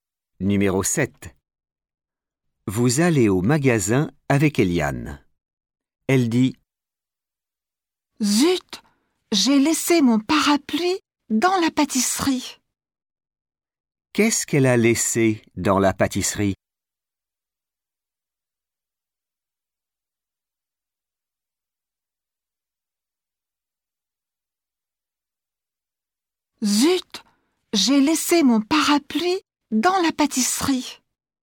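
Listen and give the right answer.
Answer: Son parapluie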